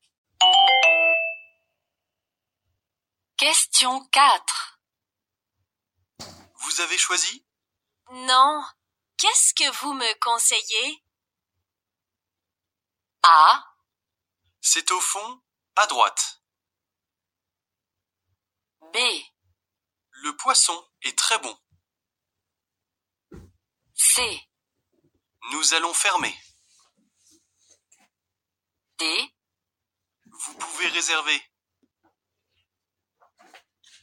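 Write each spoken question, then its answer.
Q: Non. Qu'est-ce que vous me conseillez?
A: B: Le poisson est très bon.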